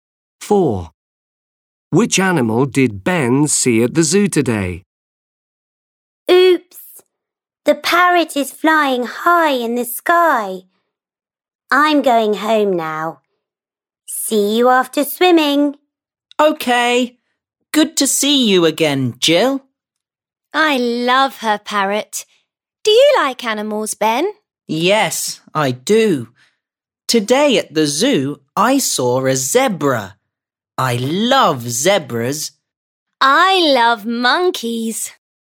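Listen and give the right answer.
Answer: a zebra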